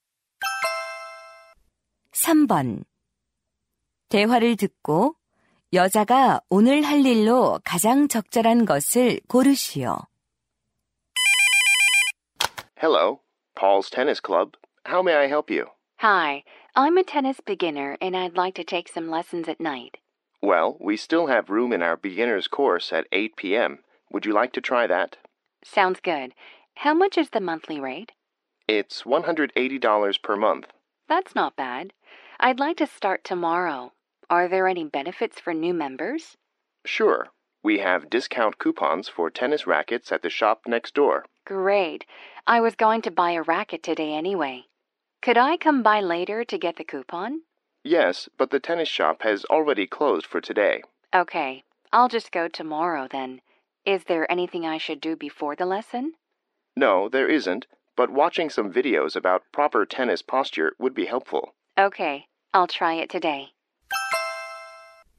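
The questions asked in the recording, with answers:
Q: 대화를 듣고 여자가 오늘 할 일로 가장 적절한 것을 고르시오.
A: 테니스 자세 영상 보기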